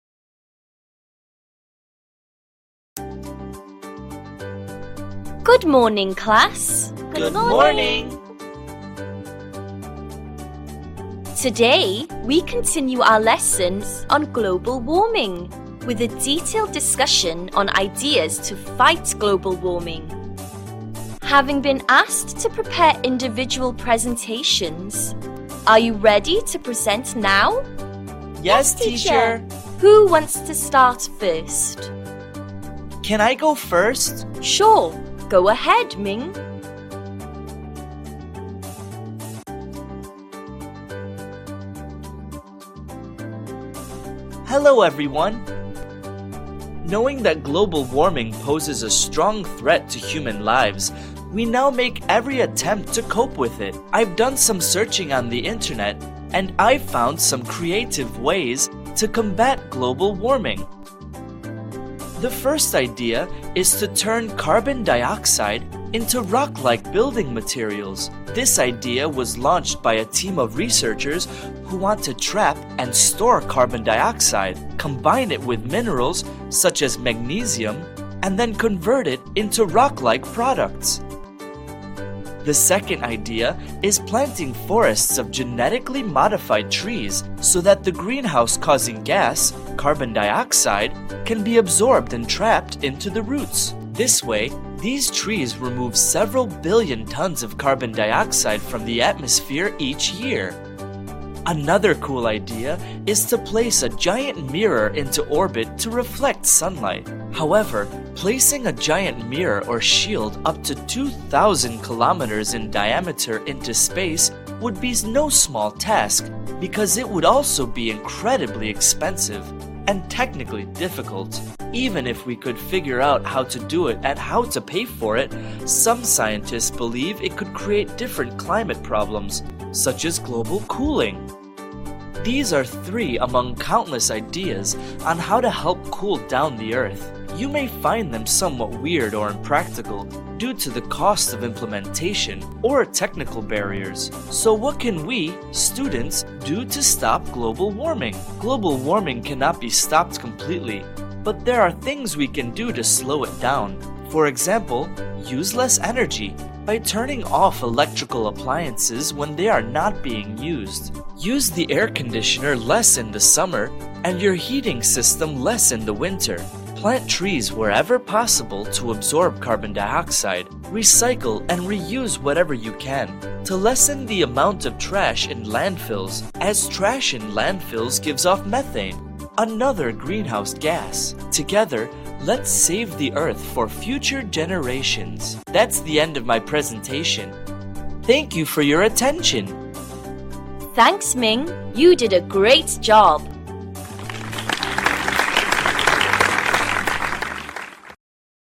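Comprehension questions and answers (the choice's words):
Task: Match the ideas with their descriptions.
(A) Difficult and expensive to build in space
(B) Helps trap carbon dioxide in the roots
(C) Converts CO2 into solid materials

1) Turning CO2 into rock-like materials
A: Converts CO2 into solid materials

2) Genetically modified trees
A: Helps trap carbon dioxide in the roots

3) Giant mirror in orbit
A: Difficult and expensive to build in space

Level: lớp 11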